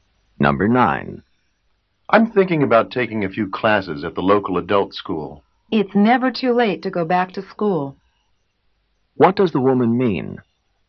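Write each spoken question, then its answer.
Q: What does the woman mean?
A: He should take the classes; it's not too late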